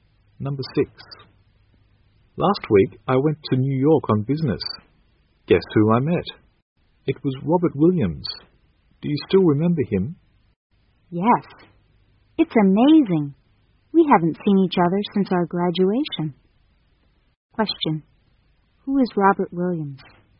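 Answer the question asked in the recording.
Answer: A former classmate of theirs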